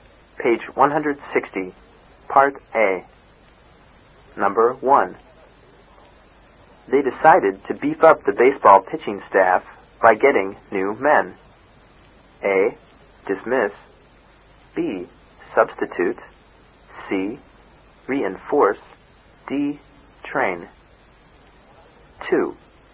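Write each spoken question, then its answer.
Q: They decided to beef up the baseball pitching staff by getting new men.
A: C: Reinforce.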